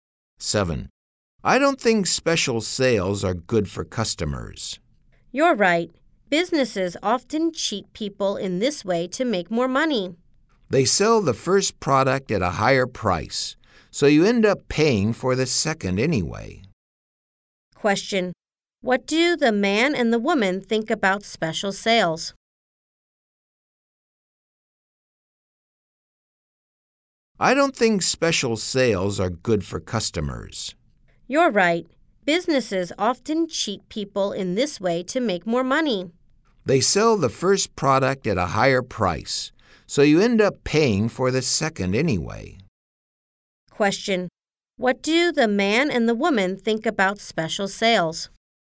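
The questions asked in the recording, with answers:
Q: Question. What do the man and the woman think about special sales?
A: They are not good for customers.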